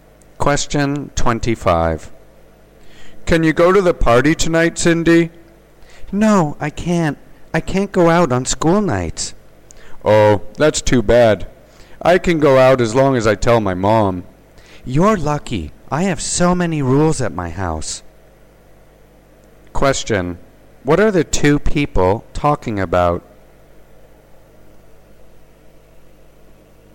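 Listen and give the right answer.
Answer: Family rules about going out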